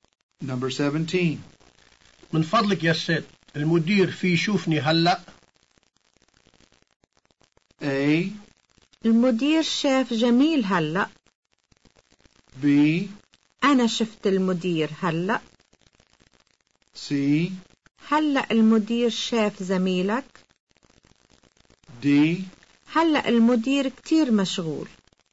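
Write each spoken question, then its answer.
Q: من فضلك يا ست، المدير في يشوفني هلأ؟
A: D: هلأ المدير كتير مشغول.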